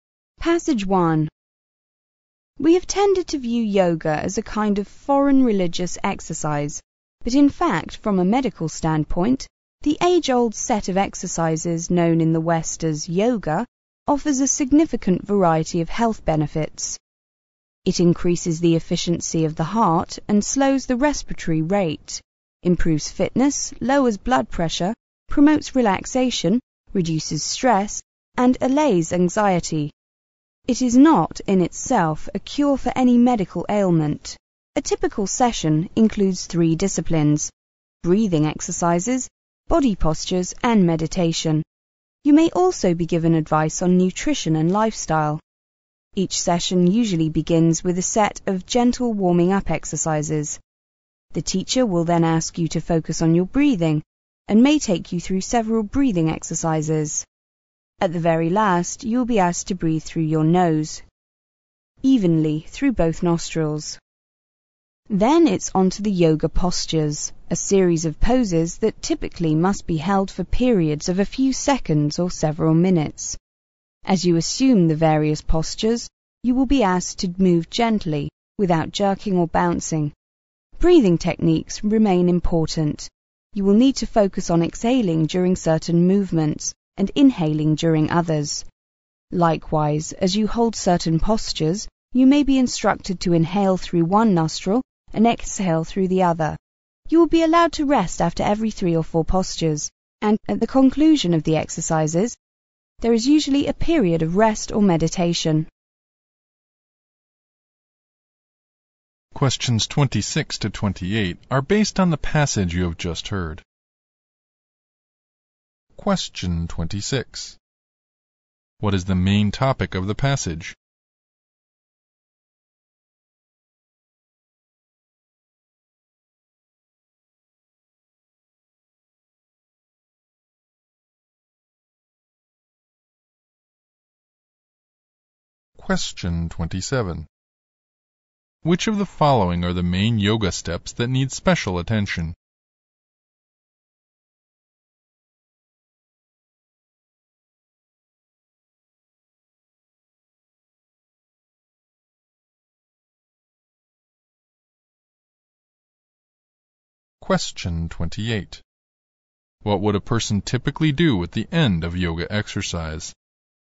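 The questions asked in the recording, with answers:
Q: What would a person typically do at the end of yoga exercise?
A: Rest or meditate.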